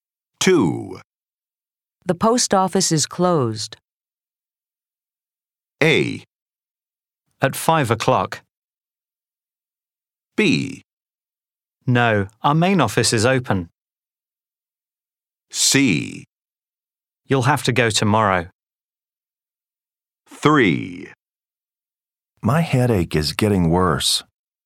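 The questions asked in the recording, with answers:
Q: The post office is closed.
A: C: You'll have to go tomorrow.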